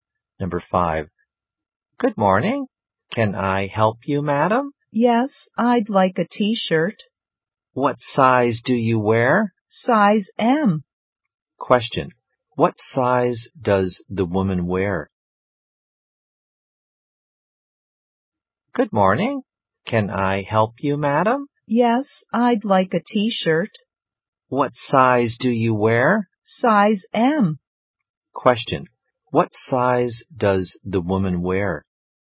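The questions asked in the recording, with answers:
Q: What size does the woman wear?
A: Size M.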